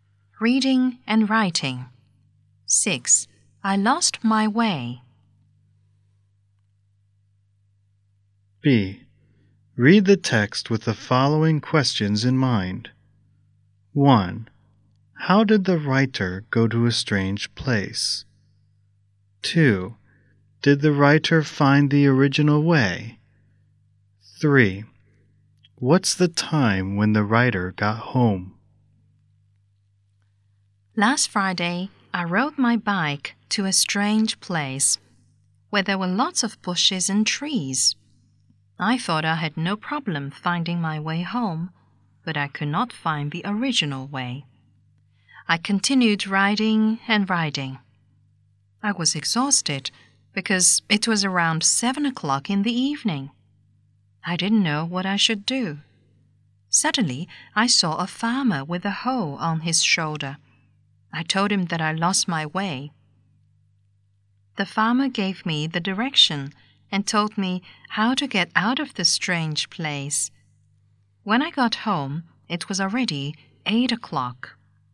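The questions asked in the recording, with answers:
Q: How did the writer go to a strange place?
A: By bike

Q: Did the writer find the original way?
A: No

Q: What's the time when the writer got home?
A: 8 o'clock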